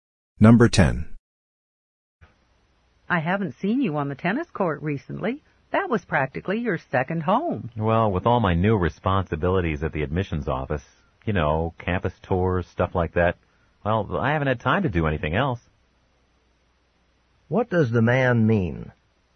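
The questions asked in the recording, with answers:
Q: What does the man mean?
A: His new job at the admissions office leaves him no time for tennis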